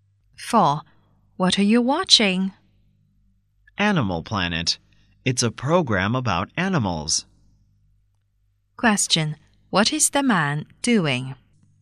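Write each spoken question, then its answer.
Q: What is the man doing?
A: Watching a program about animals on Animal Planet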